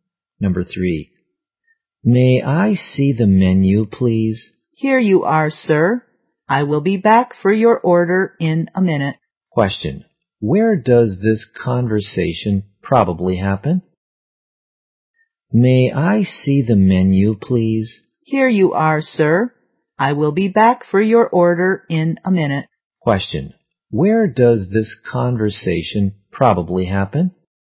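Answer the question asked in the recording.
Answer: In a restaurant.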